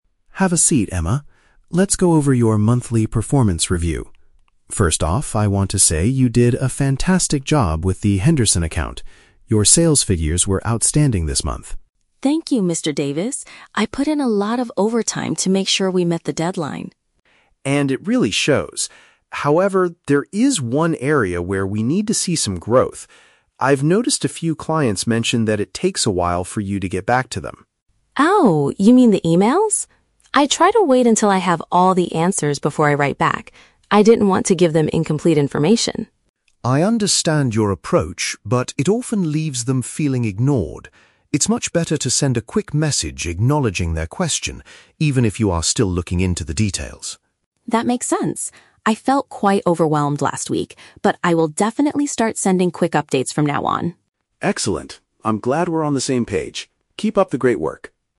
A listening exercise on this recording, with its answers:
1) What was the main reason for the manager's positive feedback?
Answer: Emma's impressive sales numbers.

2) Why did Emma delay her replies to the clients?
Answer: She wanted to gather all the necessary facts first.

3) How did Emma describe her feelings during the previous week?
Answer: She felt highly stressed by her workload.

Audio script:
Mr. Davis: Have a seat, Emma. Let's go over your monthly performance review. First off, I want to say you did a fantastic job with the Henderson account. Your sales figures were outstanding this month.
Emma: Thank you, Mr. Davis. I put in a lot of overtime to make sure we met the deadline.
Mr. Davis: And it really shows. However, there is one area where we need to see some growth. I've noticed a few clients mentioned that it takes a while for you to get back to them.
Emma: Oh, you mean the emails? I try to wait until I have all the answers before I write back. I didn't want to give them incomplete information.
Mr. Davis: I understand your approach, but it often leaves them feeling ignored. It's much better to send a quick message acknowledging their question, even if you are still looking into the details.
Emma: That makes sense. I felt quite overwhelmed last week, but I will definitely start sending quick updates from now on.